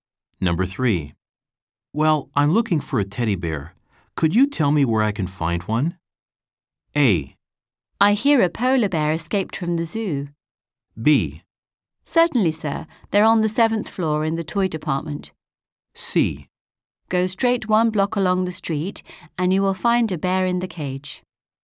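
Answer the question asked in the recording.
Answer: B: Certainly, sir. They're on the 7th floor in the toy department.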